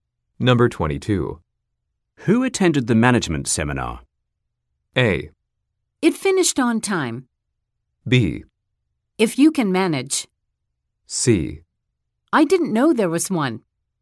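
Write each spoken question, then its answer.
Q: Who attended the management seminar?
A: C: I didn't know there was one.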